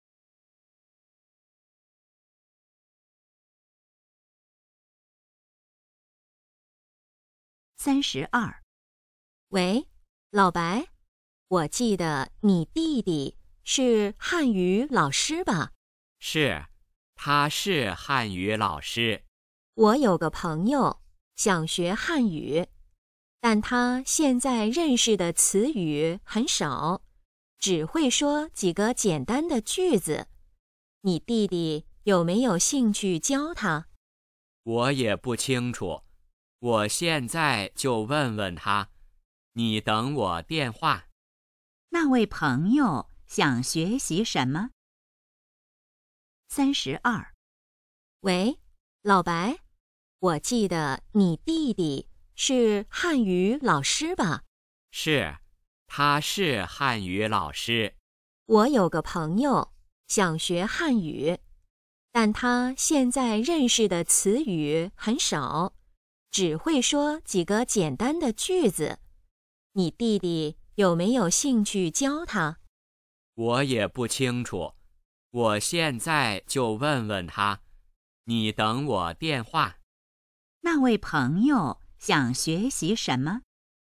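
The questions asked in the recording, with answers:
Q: 那位朋友想学习什么?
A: 汉语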